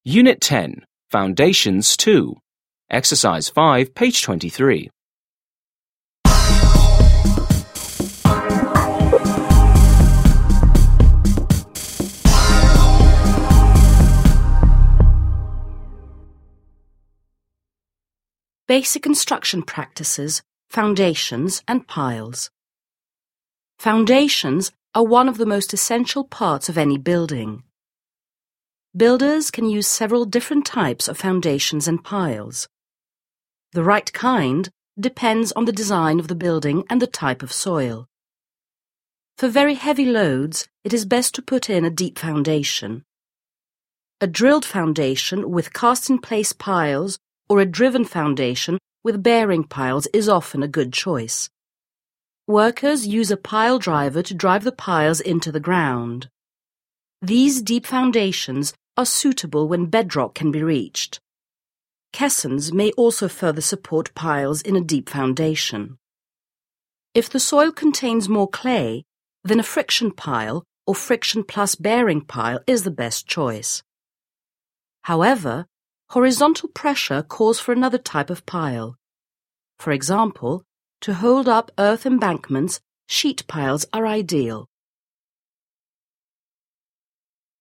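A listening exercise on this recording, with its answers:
5. Listen and read the textbook entry again. What types of foundations use piles?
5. What types of foundations use piles?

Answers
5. Deep foundations: drilled foundations (cast-in-place piles) and driven foundations (bearing piles)

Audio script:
Unit 10. Foundations 2. (textbook) Foundations and Piles
Foundations are one of the most essential parts of any building. Builders can use several different types of foundations and piles. The right kind depends on the design of the building and the type of soil. For very heavy loads, it is best to put in a deep foundation. A drilled foundation with cast-in-place piles or a driven foundation with bearing piles is often a good choice. Workers use a pile driver to drive the piles into the ground. These deep foundations are suitable when bedrock can be reached. Caissons may also further support piles in a deep foundation. 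If the soil contains more clay, then a friction pile or friction plus bearing pile is the best choice. However, horizontal pressure calls for another type of pile. For example, to hold up earth embankments, sheet piles are ideal.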